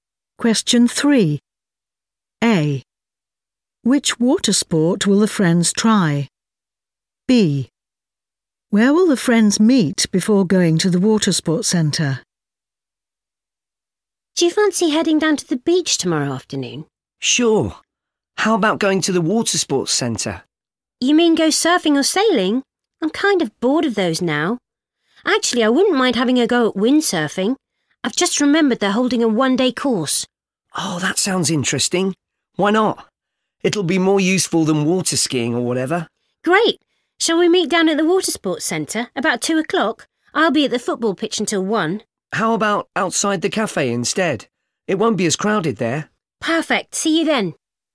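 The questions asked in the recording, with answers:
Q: Which water sport will the friends try?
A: windsurfing

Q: Where will the friends meet before going to the water sports centre?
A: outside the cafe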